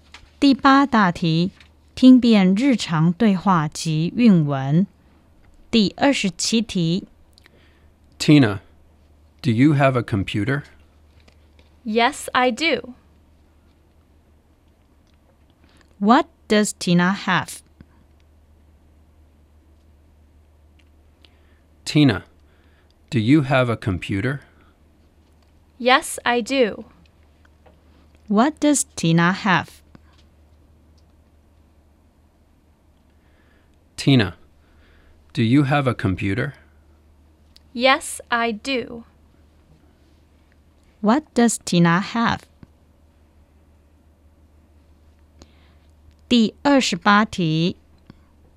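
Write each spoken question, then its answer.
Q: What does Tina have?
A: A computer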